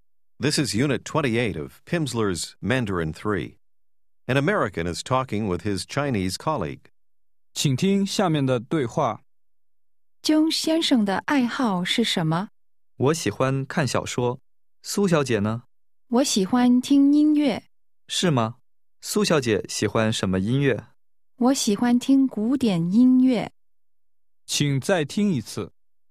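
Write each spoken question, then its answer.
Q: 姜先生的爱好是什么?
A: 看小说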